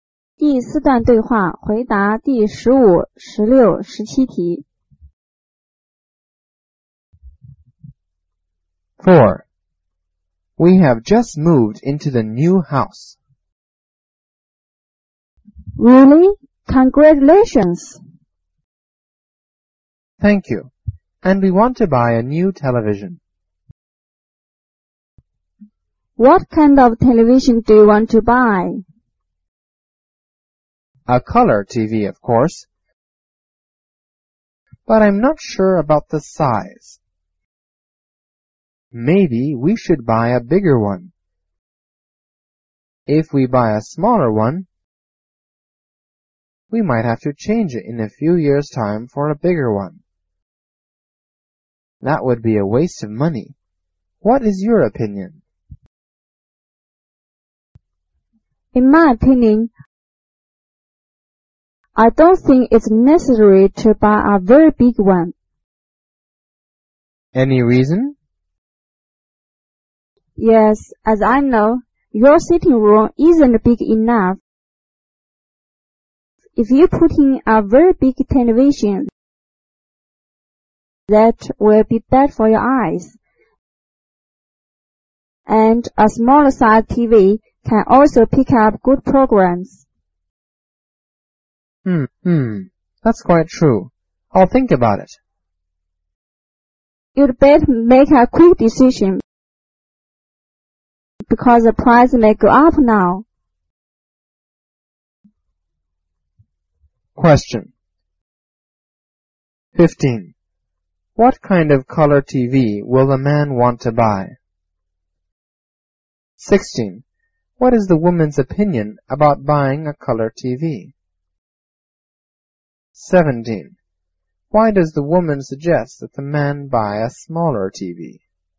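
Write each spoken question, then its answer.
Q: What is the woman's opinion about buying a color TV?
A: It's not necessary to buy a very big one

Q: Why does the woman suggest that the man buy a smaller TV?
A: His sitting room isn't big enough and a big TV would be bad for his eyes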